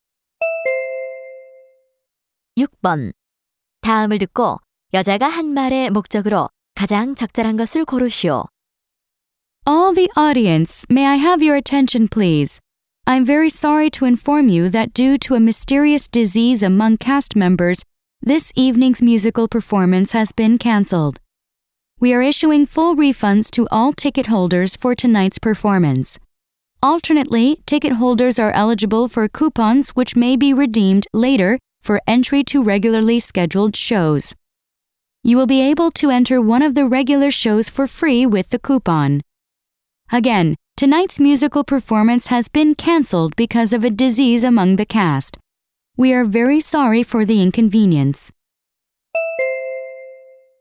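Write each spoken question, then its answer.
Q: 다음을 듣고 여자가 한 말의 목적으로 가장 적절한 것을 고르시오.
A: 뮤지컬 공연 취소 안내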